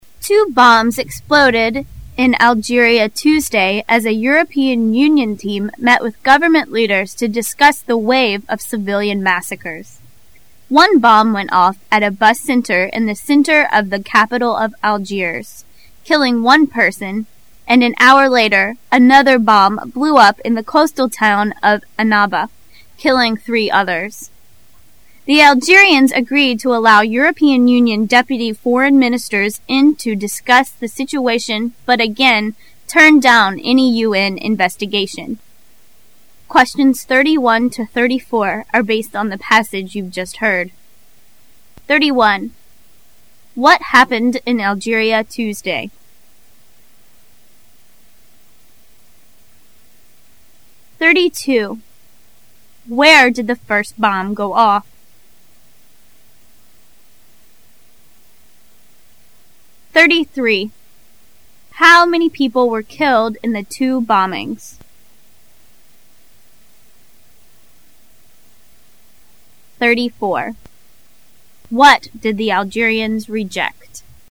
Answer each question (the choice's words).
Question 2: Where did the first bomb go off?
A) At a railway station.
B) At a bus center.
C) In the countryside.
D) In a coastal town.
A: At a bus center.

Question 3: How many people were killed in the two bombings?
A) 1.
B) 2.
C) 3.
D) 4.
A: 4.

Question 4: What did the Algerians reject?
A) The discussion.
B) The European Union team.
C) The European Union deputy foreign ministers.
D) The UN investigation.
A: The UN investigation.

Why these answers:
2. Where did the first bomb go off? [试题分析]本题是一道细节题。 [关键词语]a bus center [详细解答]这道题要求考生注意细节,也就是事件发生的地点.
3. How many people were killed in the two bombings? [试题分析]本题是一道简单计算题。 [关键词语]killing one person,killing 3 others [详细解答]我们一再要求考生对听音中听到的数字要保持敏感,这道题中只要考生记住了数字,就只是一个简单的l+3=4的问题。
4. What did the Algerians reject? [试题分析]本题是一道细节题。 [关键词语]turned down any UN investigation [详细解答]这道题要求考生理解"turn down"一词的含义为"拒绝,摒斥",只要了解这一点,答案是显然的。

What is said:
[解析] 31-34 Two bombs exploded in Algeria Tuesday as a European Union team met with government leaders to discuss the wave of civilian massacres. One bomb went off at a bus center in the center of the capital of Algiers, killing one person, and an hour later, another bomb blew up in the coastal town of Annabel, killing 3 others. The Algerians a- greed to allow European Union deputy foreign ministers into discuss the situation but again, turned down any UN investigation. What happened in Algeria Tuesday?